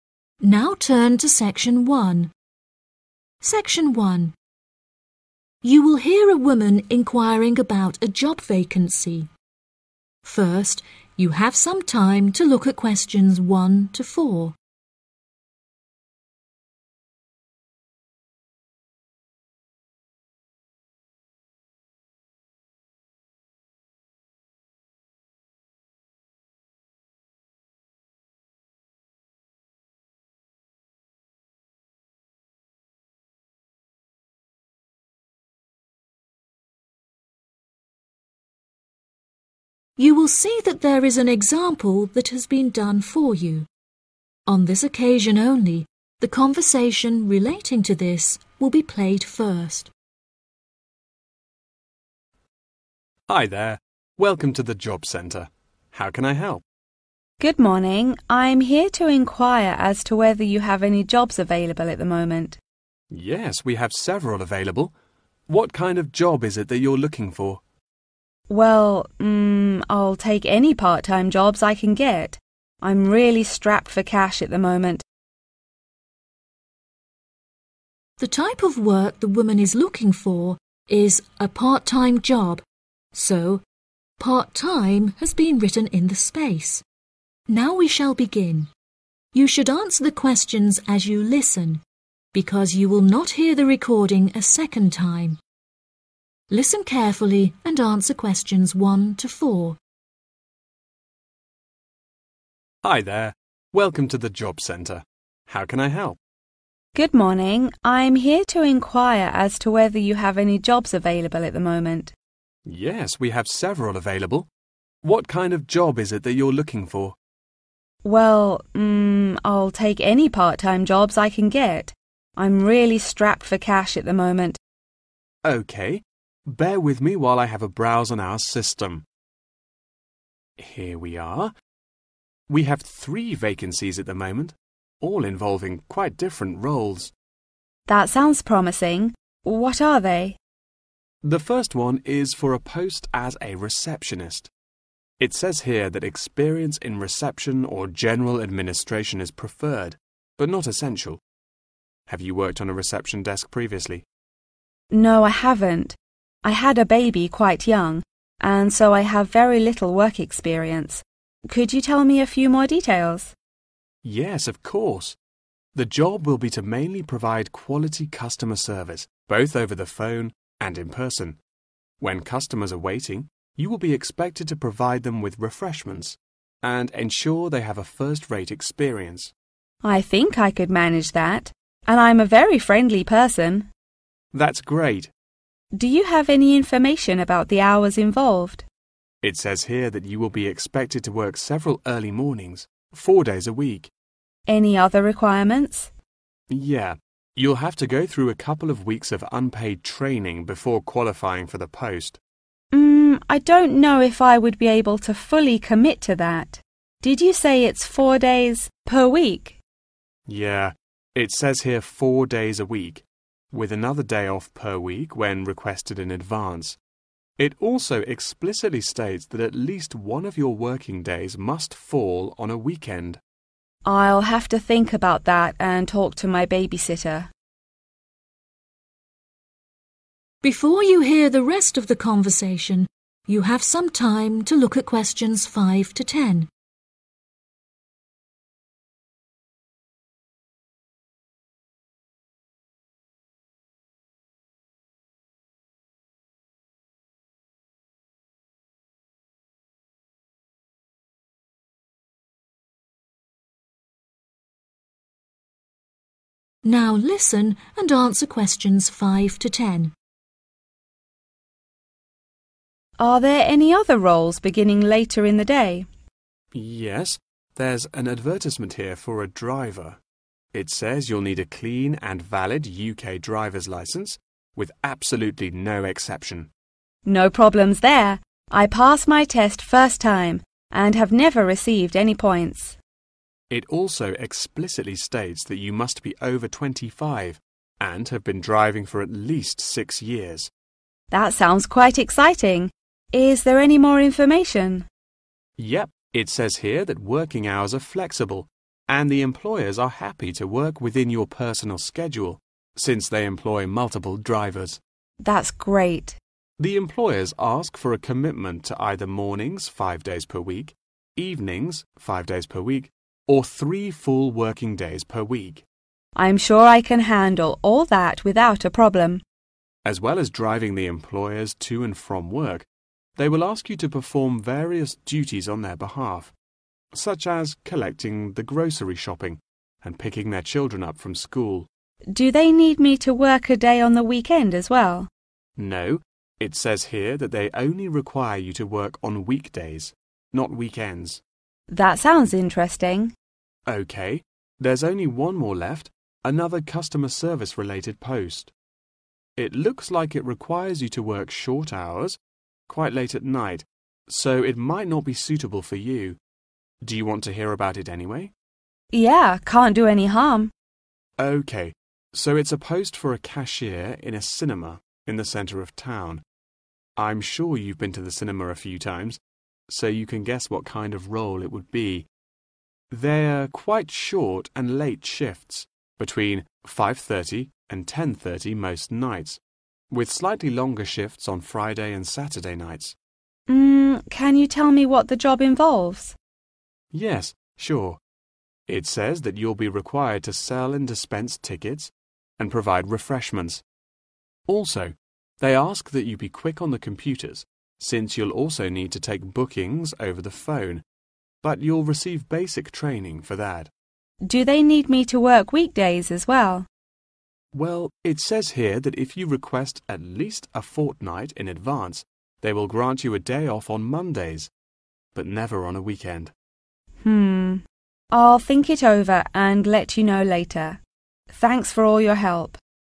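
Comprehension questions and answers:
Complete the notes below. Write NO MORE THAN TWO WORDS for each answer.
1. Position Available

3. Working hours: 3.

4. Requirement: receive 4. without pay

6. Working hours: 6.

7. to collect the 7.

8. Day off: 8.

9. Cashier in a 9.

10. to take 10.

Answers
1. receptionist
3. early mornings
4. training
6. flexible
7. grocery shopping
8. weekends
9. cinema
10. bookings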